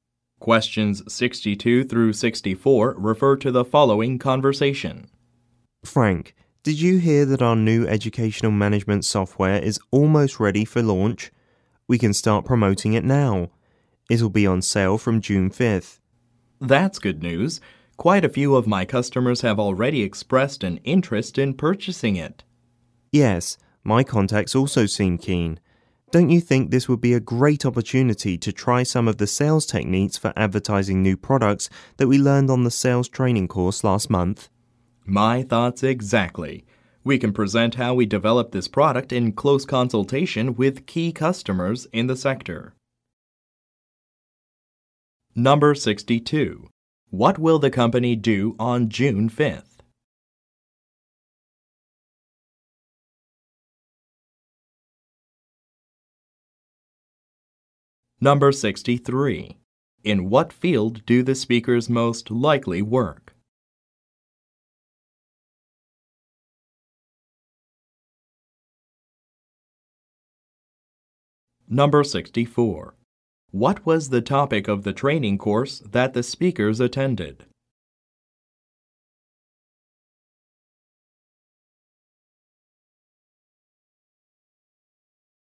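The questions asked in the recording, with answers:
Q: What will the company do on June 5th?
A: Launch (start selling) its new educational management software

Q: What was the topic of the training course that the speakers attended?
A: Sales techniques for advertising new products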